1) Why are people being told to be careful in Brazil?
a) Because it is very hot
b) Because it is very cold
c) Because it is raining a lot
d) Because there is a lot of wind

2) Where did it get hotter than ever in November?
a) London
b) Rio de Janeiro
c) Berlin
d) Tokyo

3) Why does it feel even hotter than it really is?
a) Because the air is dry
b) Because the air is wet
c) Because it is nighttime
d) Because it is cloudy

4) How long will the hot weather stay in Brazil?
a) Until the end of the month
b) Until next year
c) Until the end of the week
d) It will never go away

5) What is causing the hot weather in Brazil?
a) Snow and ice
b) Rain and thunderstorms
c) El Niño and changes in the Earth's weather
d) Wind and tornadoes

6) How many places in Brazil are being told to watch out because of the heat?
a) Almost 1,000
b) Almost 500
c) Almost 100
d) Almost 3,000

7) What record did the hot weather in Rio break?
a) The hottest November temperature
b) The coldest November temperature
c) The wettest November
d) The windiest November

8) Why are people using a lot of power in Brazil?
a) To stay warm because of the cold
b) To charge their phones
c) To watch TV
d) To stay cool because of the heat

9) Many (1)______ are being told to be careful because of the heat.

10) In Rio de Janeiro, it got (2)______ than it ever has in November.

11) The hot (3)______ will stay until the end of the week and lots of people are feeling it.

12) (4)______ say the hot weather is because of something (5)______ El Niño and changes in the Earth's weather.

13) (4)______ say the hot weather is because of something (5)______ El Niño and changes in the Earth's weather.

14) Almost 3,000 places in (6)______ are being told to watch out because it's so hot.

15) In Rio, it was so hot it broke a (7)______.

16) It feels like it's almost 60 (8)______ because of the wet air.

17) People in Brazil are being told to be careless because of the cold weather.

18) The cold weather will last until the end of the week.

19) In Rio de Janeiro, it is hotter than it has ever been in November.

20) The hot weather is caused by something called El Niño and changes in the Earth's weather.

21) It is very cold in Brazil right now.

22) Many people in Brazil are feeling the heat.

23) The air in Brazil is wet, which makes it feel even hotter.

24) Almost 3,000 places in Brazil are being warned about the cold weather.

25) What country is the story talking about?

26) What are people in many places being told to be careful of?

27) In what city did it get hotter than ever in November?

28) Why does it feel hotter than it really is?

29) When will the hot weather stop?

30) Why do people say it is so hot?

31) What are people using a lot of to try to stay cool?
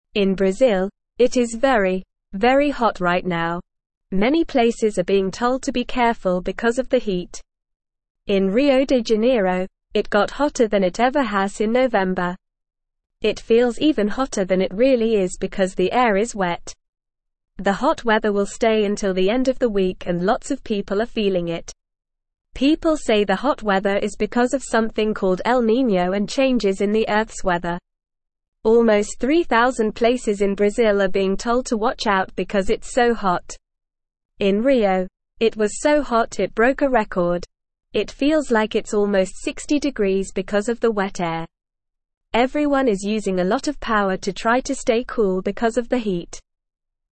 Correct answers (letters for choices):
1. a
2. b
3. b
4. c
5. c
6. d
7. a
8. d
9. places
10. hotter
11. weather
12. People
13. called
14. Brazil
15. record
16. degrees
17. False
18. False
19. True
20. True
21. False
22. True
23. True
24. False
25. The story is talking about Brazil.
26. People are being told to be careful of the heat.
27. It got hotter than ever in November in Rio de Janeiro.
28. It feels hotter because the air is wet.
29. The hot weather will stop at the end of the week.
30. People say it is so hot because of El Niño and changes in the Earth's weather.
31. People are using a lot of power to try to stay cool.

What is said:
In Brazil, it is very, very hot right now. Many places are being told to be careful because of the heat. In Rio de Janeiro, it got hotter than it ever has in November. It feels even hotter than it really is because the air is wet. The hot weather will stay until the end of the week and lots of people are feeling it.
People say the hot weather is because of something called El Niño and changes in the Earth's weather. Almost 3,000 places in Brazil are being told to watch out because it's so hot. In Rio, it was so hot it broke a record. It feels like it's almost 60 degrees because of the wet air. Everyone is using a lot of power to try to stay cool because of the heat.

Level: Level 1